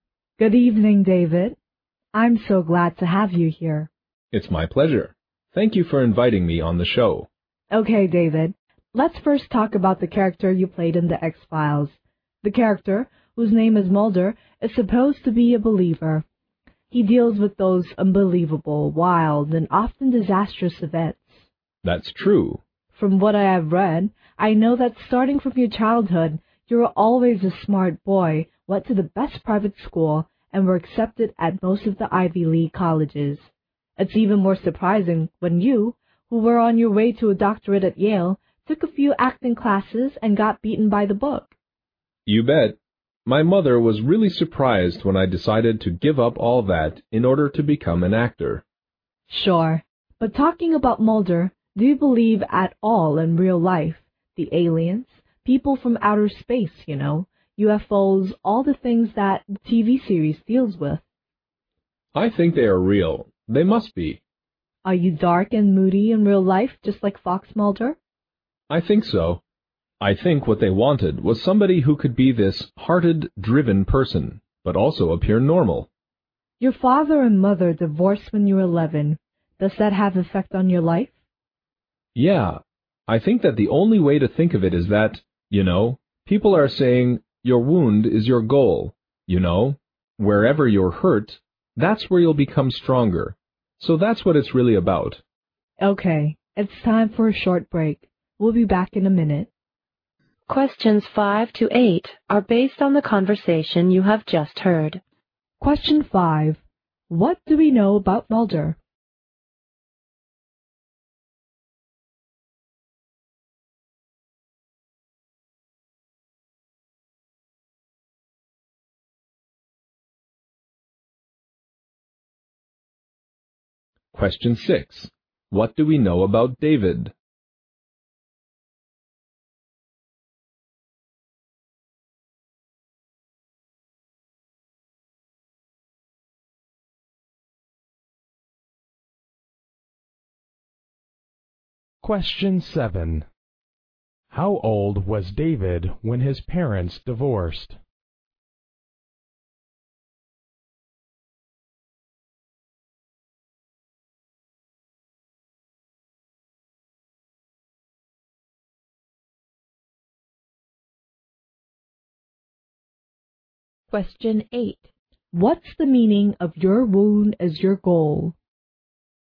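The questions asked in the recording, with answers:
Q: How old was David when his parents divorced?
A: 11

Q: What's the meaning of your wound as your goal?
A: Wherever you're hurt, that's where you'll become stronger.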